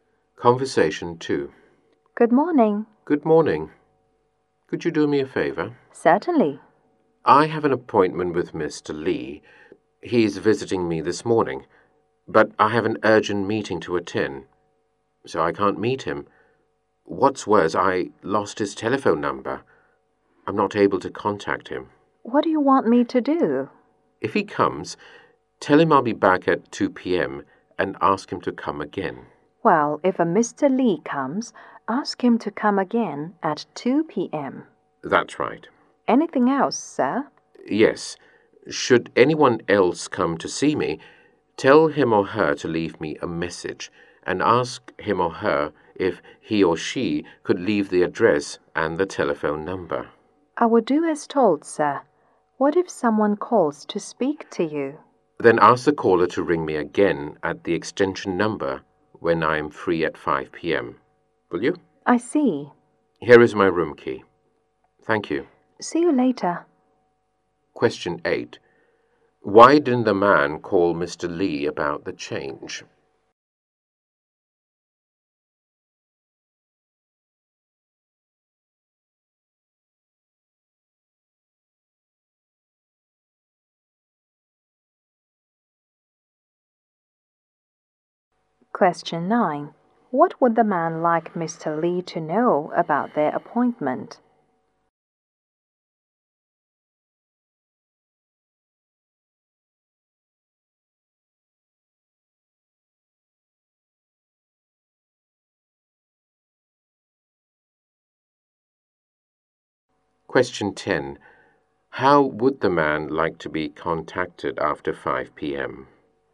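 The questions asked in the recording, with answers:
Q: Why didn't the man call Mr. Lee about the change?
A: He lost Mr. Lee's telephone number

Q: What would the man like Mr. Lee to know about their appointment?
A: To come again at 2 p.m.

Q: How would the man like to be contacted after 5 p.m.?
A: By calling his extension number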